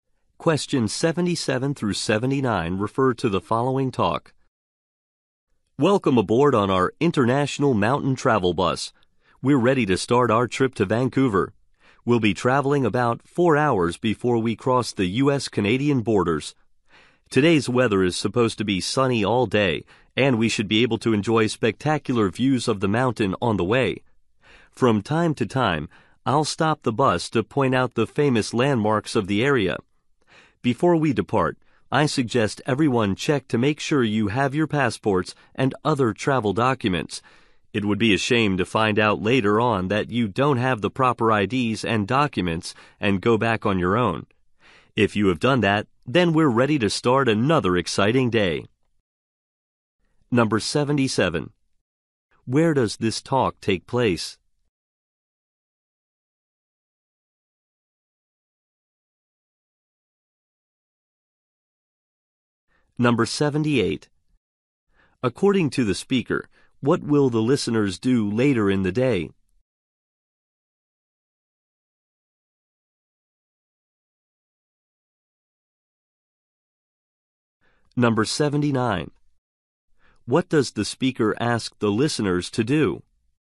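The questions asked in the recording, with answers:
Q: Where does this talk take place?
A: On a tour bus

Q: According to the speaker, what will the listeners do later in the day?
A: Cross the U.S.-Canadian border

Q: What does the speaker ask the listeners to do?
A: Check their passports and travel documents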